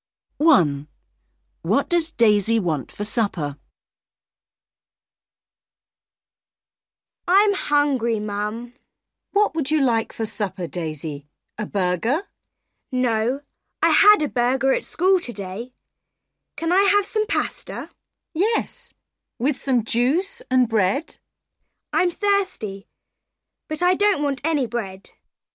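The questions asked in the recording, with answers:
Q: What does Daisy want for supper?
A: pasta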